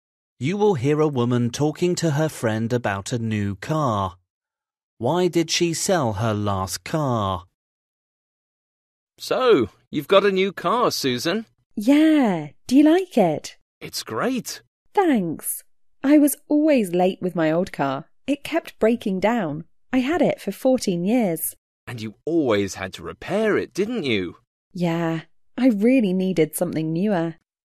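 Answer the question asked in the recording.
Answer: It kept breaking down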